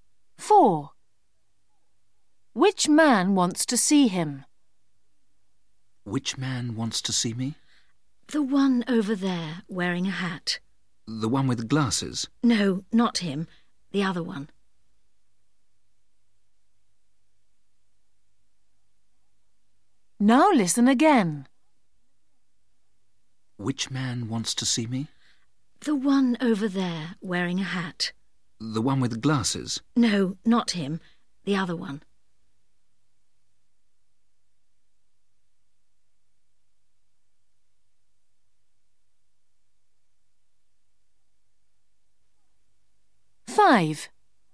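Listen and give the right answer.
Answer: The man wearing a hat, without glasses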